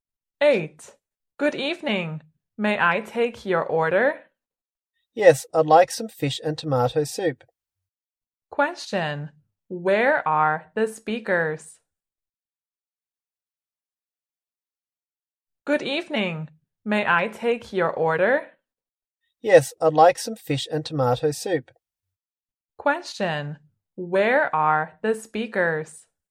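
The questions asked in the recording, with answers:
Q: Where are the speakers?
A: In a restaurant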